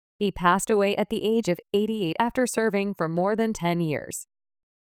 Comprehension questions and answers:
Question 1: He passed away at the age of 88 ( ).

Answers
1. after serving for more than ten years

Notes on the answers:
▶ 「for more than ten years」の前置詞を落として「more than ten years」と書いてしまった。 ⇒ 弱音の前置詞「for」は軽く弱く発音されるため、聞き取りに注意が必要です。

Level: 中級脱出